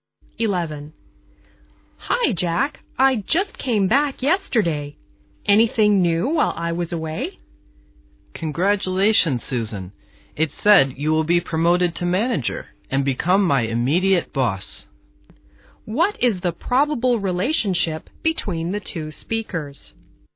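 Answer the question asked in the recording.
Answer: Colleagues; Susan will become the man's boss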